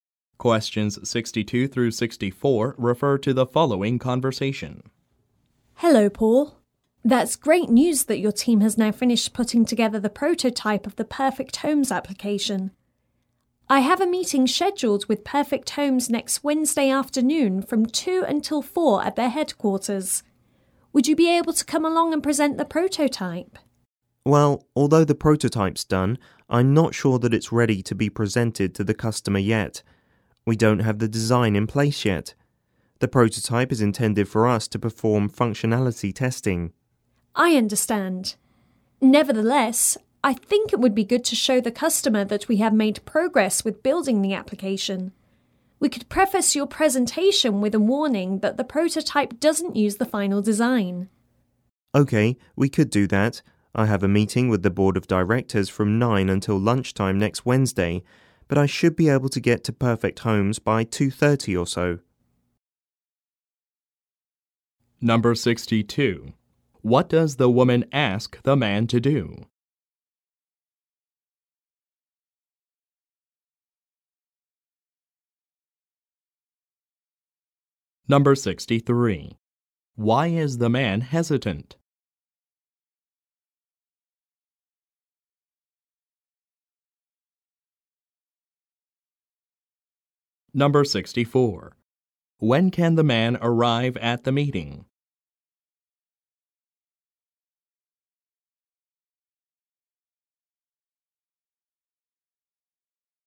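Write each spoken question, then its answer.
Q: What does the woman ask the man to do?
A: Present the prototype at a meeting with Perfect Homes

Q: Why is the man hesitant?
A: The prototype's design isn't in place yet; it's only meant for functionality testing

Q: When can the man arrive at the meeting?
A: Around 2:30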